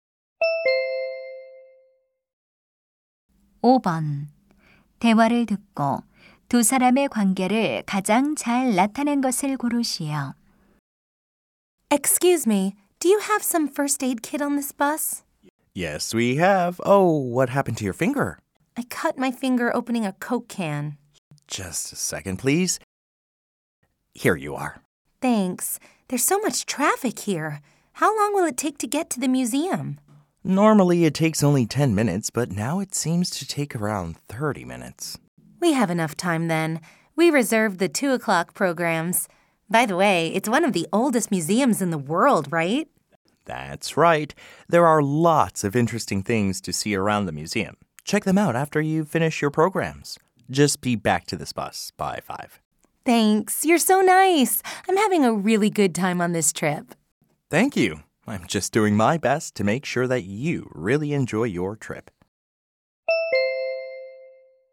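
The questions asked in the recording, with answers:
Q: 두 사람의 관계를 가장 잘 나타낸 것을 고르시오.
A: 관광객 - 여행 가이드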